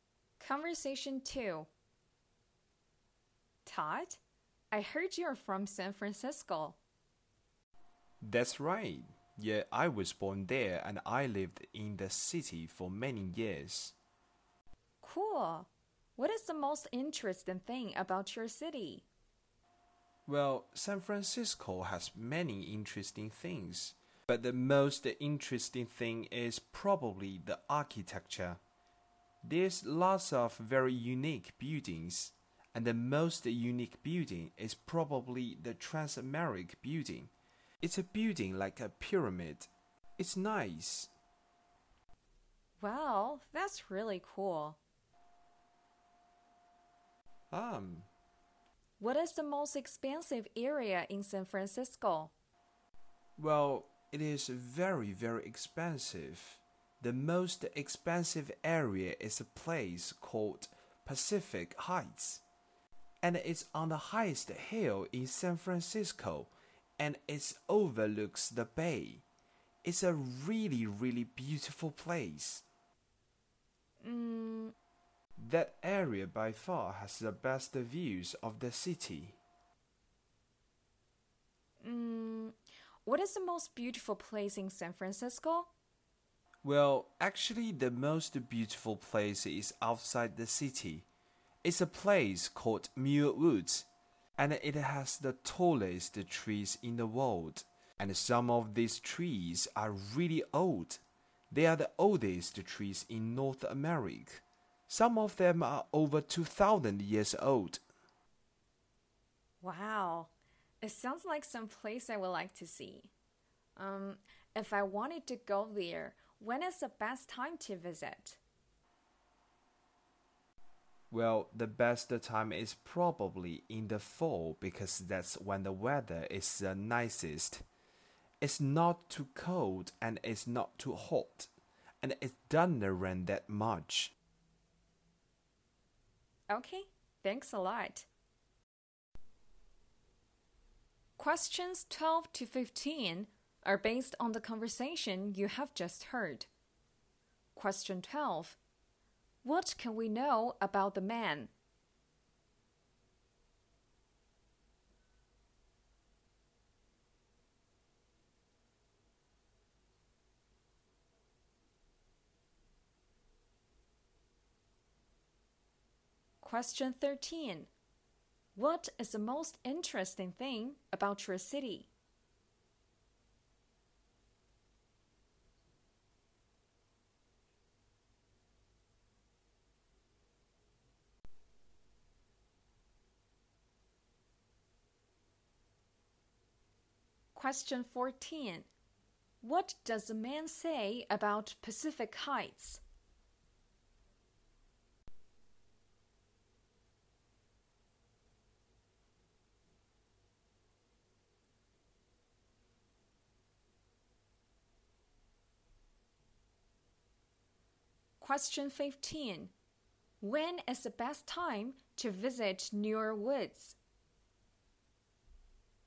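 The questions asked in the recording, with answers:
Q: What can we know about the man?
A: He was born in San Francisco and lived there for many years.

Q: What is the most interesting thing about your city?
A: The architecture.

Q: What does the man say about Pacific Heights?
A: It is the most expensive area, on the highest hill, with the best views.

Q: When is the best time to visit Newark Woods?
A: In the fall.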